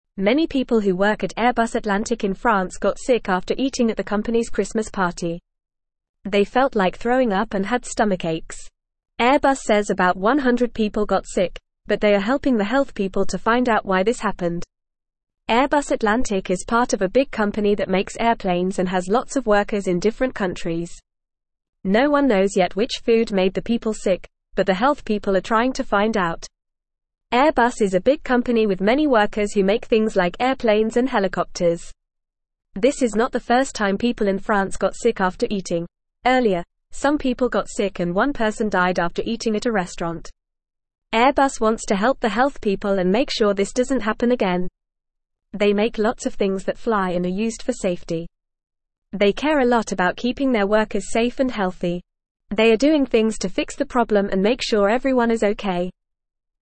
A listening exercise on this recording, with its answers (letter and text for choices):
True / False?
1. Around 100 people at Airbus Atlantic remained healthy.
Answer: False

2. The company is not collaborating with health officials to investigate why this occurred.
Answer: False

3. This is not the first time people in France got sick after eating; there was a similar incident at a restaurant before.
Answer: True

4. Many people at Airbus Atlantic in France got sick after eating at their Christmas party.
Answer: True

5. The sick people felt like throwing up and had stomach aches.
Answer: True

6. The health officials are struggling to determine which food made the people sick.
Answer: False

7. Airbus is taking steps to fix the problem and make sure everyone is safe and healthy.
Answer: True

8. Many (1)______ who work at (2)______ Atlantic in France got sick after eating at the company's Christmas party.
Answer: people

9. Many (1)______ who work at (2)______ Atlantic in France got sick after eating at the company's Christmas party.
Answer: Airbus

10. They felt like throwing up and had stomach (3)______.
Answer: aches

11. Airbus Atlantic is (4)______ of a big (5)______ that makes airplanes and has lots of workers in (6)______ countries.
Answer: part

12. Airbus Atlantic is (4)______ of a big (5)______ that makes airplanes and has lots of workers in (6)______ countries.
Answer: company

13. Airbus Atlantic is (4)______ of a big (5)______ that makes airplanes and has lots of workers in (6)______ countries.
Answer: different

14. Airbus is a big company with many workers who make (7)______ like airplanes and (8)______.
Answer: things

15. Airbus is a big company with many workers who make (7)______ like airplanes and (8)______.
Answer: helicopters

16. earlier, some people got sick and one (9)______ died after eating at a restaurant.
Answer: person

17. Airbus wants to help the health people and make (10)______ this doesn't happen again.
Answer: sure

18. They make lots of things that fly and are used for (11)______ty.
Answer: safe

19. What happened to many people who attended the Airbus Atlantic Christmas party?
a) They got sick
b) They won a prize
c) They had a great time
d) They got a promotion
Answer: a) They got sick

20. How many people got sick after eating at the Christmas party?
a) About 50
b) About 200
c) About 20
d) About 100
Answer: d) About 100

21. What is Airbus Atlantic a part of?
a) A big company that makes airplanes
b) A small company that makes cars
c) A restaurant chain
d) A company that makes computers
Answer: a) A big company that makes airplanes

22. What happened to some people in France after eating at a restaurant?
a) They won a contest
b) They had a great meal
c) They got sick and one person died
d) They got a job offer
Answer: c) They got sick and one person died

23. What does Airbus want to make sure doesn't happen again?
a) People winning prizes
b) People getting sick after eating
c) People having a great time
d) People getting promotions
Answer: b) People getting sick after eating

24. What does Airbus make?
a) Things that swim and are used for fun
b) Things that drive and are used for transportation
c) Things that fly and are used for safety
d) Things that crawl and are used for gardening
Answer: c) Things that fly and are used for safety

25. What is Airbus doing to fix the problem?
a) Ignoring the problem and hoping it goes away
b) Helping the health people find out why people got sick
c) Closing down the company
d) Giving everyone a raise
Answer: b) Helping the health people find out why people got sick

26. What happened to the people who ate at Airbus's Christmas party?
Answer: They got sick after eating.

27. How many people got sick after eating at the party?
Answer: About 100 people got sick.

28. What kind of company is Airbus?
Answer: Airbus is a company that makes airplanes and helicopters.

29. Has this happened before in France?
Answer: Yes, it has happened before in France.

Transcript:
Many people who work at Airbus Atlantic in France got sick after eating at the company's Christmas party. They felt like throwing up and had stomach aches. Airbus says about 100 people got sick, but they are helping the health people to find out why this happened. Airbus Atlantic is part of a big company that makes airplanes and has lots of workers in different countries.
No one knows yet which food made the people sick, but the health people are trying to find out. Airbus is a big company with many workers who make things like airplanes and helicopters. This is not the first time people in France got sick after eating; earlier, some people got sick and one person died after eating at a restaurant.
Airbus wants to help the health people and make sure this doesn't happen again. They make lots of things that fly and are used for safety. They care a lot about keeping their workers safe and healthy. They are doing things to fix the problem and make sure everyone is okay.

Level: Level 2